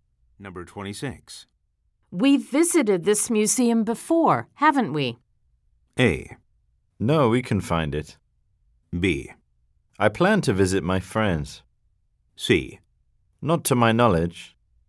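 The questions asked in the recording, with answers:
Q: We've visited this museum before, haven't we?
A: C: Not to my knowledge.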